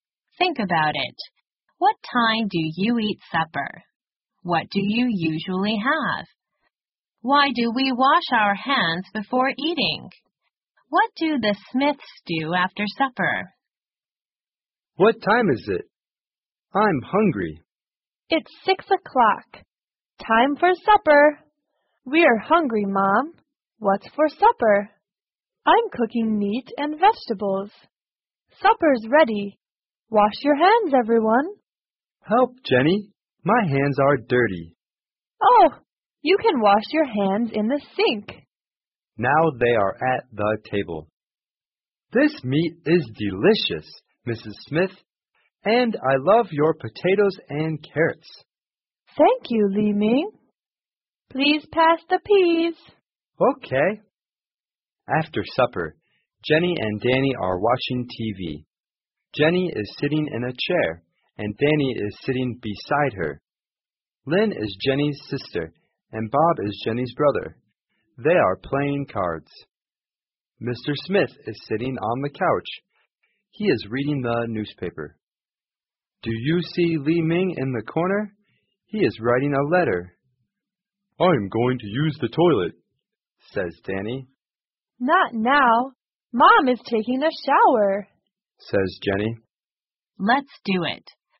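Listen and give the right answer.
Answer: Jenny and Danny watch TV, Lynn and Bob play cards, Mr. Smith reads the newspaper, and Mrs. Smith takes a shower.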